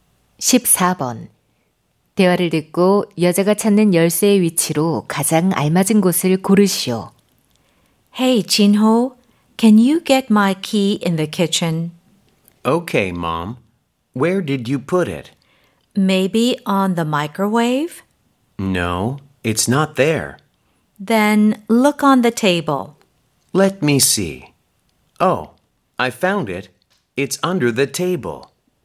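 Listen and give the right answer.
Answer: 식탁 아래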